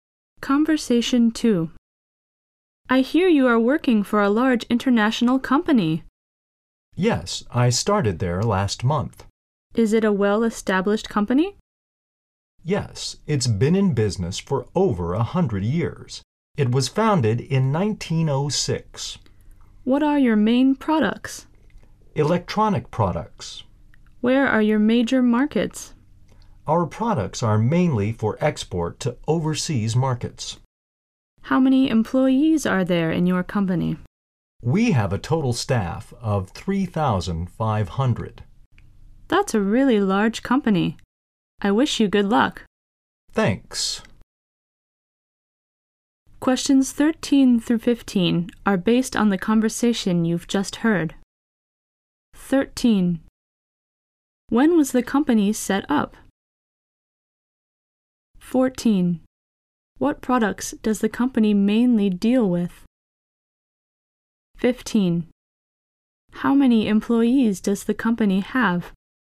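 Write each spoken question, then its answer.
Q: When was the company set up?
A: In 1906

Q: What products does the company mainly deal with?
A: Electronic products

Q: How many employees does the company have?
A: 3,500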